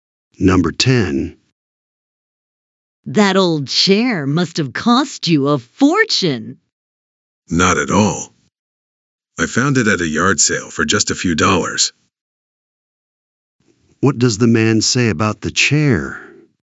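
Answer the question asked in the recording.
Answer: It was cheap; he bought it at a yard sale for a few dollars.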